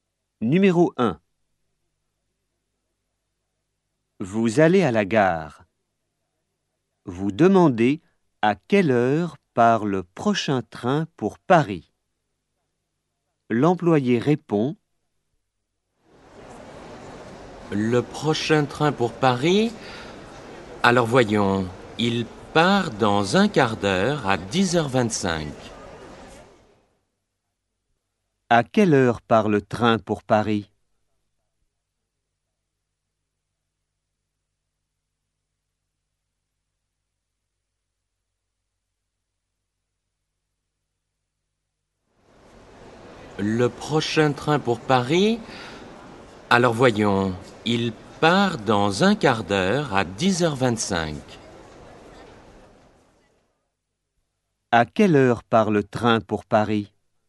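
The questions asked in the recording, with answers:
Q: À quelle heure part le train pour Paris ?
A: à 10h25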